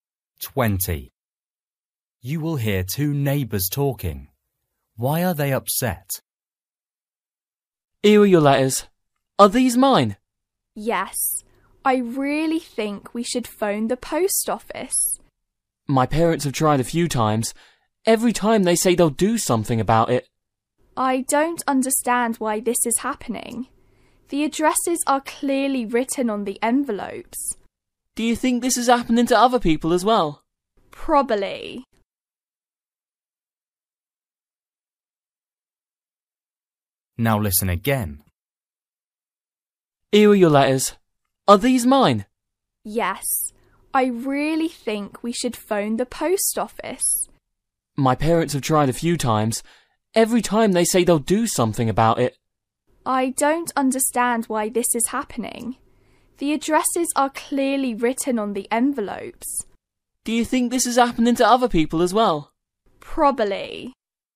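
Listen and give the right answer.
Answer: Their letters keep being delivered to the wrong address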